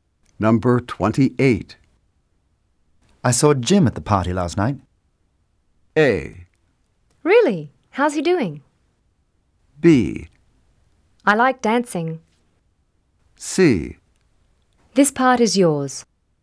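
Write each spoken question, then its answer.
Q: I saw Jim at the party last night.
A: A: Really? How's he doing?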